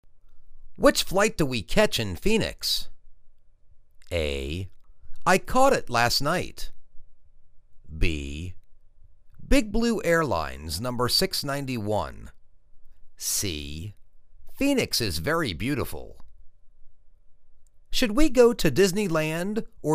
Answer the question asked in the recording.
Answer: Big Blue Airlines no. 691.